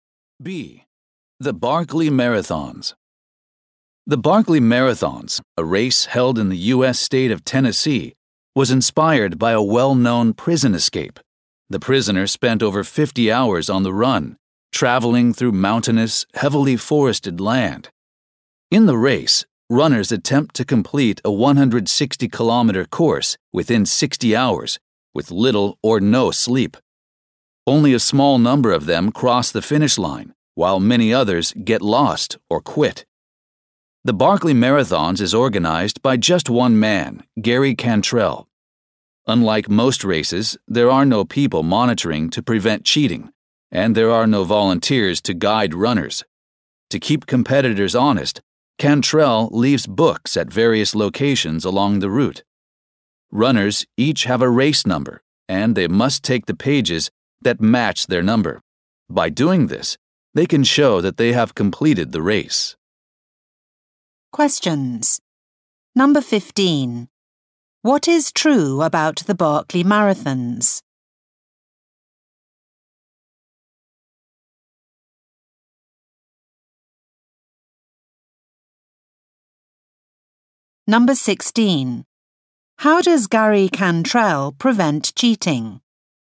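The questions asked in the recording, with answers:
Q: What is true about the Barkley Marathons?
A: It was inspired by a prison escape, and few runners finish

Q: How does Gary Cantrell prevent cheating?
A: Runners must take pages matching their number from books left along the route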